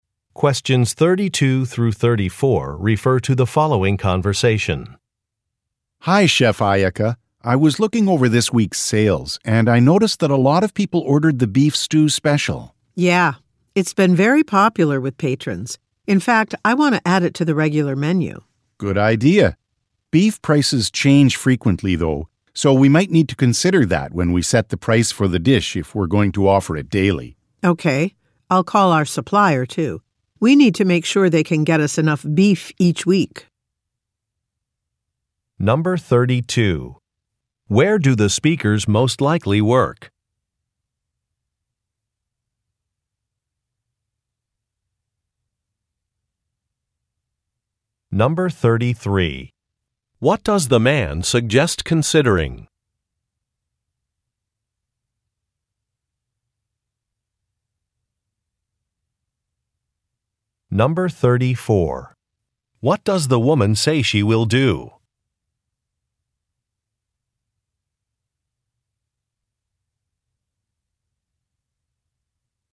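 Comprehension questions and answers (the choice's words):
Directions: You will hear some conversations between two or more people. You will be asked to answer three questions about what the speakers say in each conversation. Select the best response to each question and mark the letter (A), (B), (C), or (D) on your answer sheet. The conversations will not be printed in your test book and will be spoken only one time.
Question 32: Where do the speakers most likely work?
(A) At a shipping company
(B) At a restaurant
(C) At a gift shop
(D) At a farm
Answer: At a restaurant

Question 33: What does the man suggest considering?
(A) An advertising strategy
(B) An online menu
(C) The price of an item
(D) The results of a survey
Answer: The price of an item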